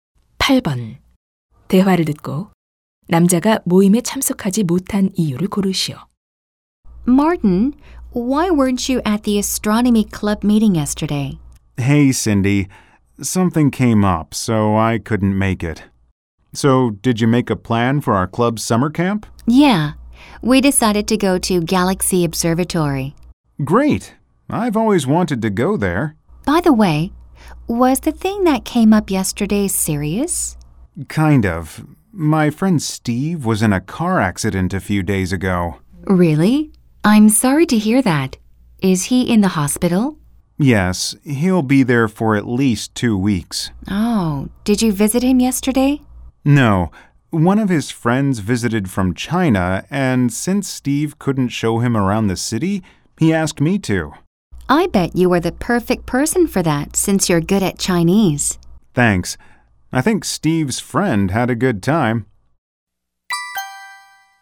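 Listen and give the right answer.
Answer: 친구 Steve 대신 중국에서 온 그의 친구에게 도시를 구경시켜 주느라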